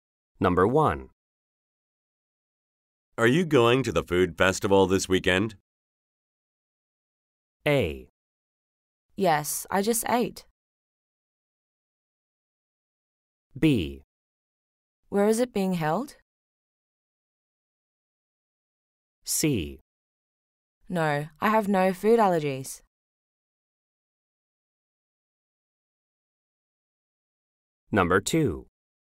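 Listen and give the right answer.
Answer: B: Where is it being held?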